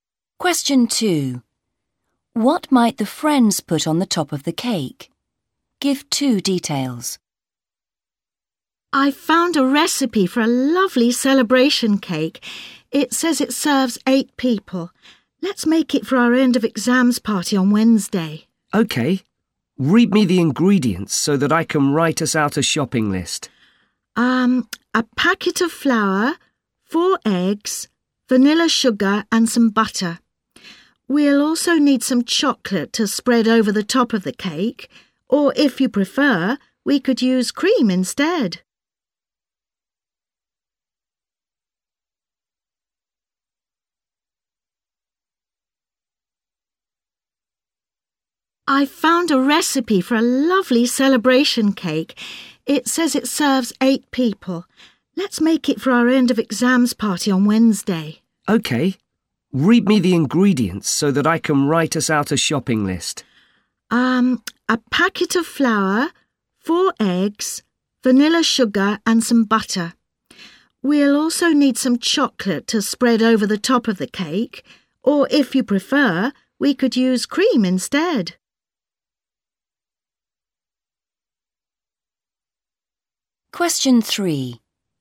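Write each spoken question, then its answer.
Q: What might the friends put on the top of the cake?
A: Chocolate or cream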